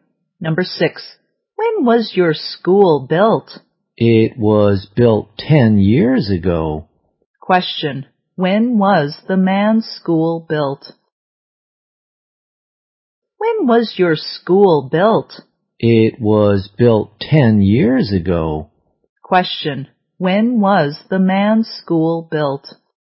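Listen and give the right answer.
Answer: 10 years ago.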